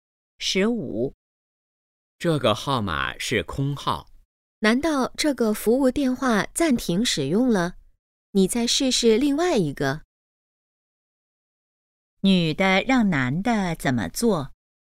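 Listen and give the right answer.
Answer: 试试另外一个号码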